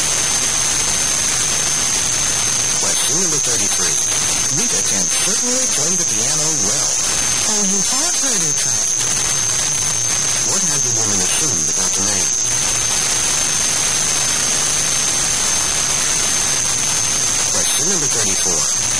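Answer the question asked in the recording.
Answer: He has heard Rita play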